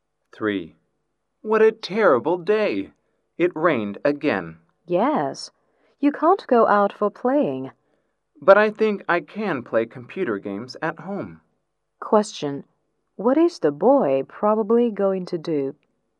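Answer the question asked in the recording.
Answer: Play computer games at home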